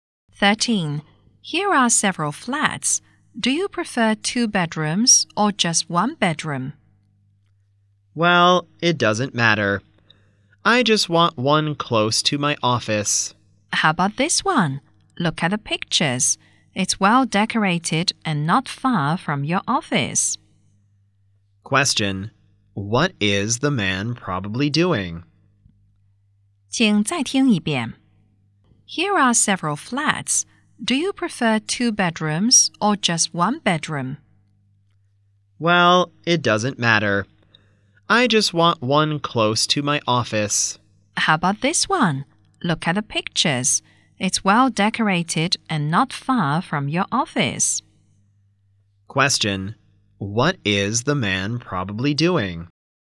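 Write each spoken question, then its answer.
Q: Question: What is the man probably doing?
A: Looking for a flat to rent or buy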